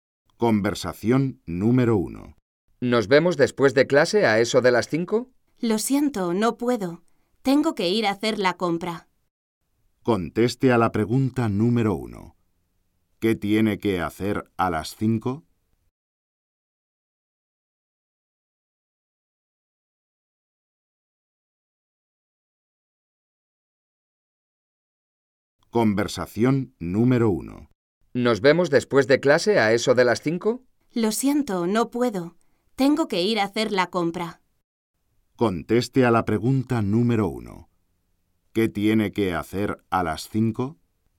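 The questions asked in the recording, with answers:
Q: ¿Qué tiene que hacer a las 5?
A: Hacer la compra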